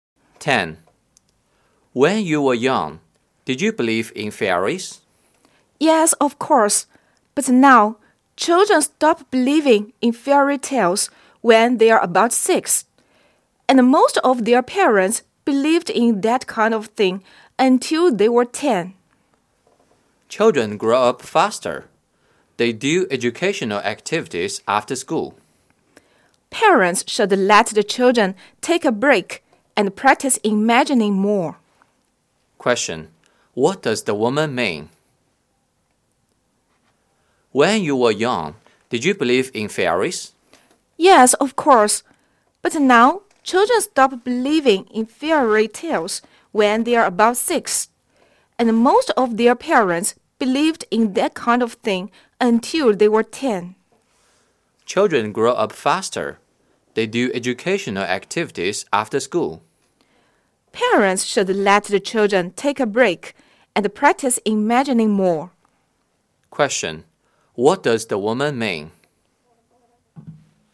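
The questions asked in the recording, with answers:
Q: What does the woman mean?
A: Parents should let children take a break and use their imagination more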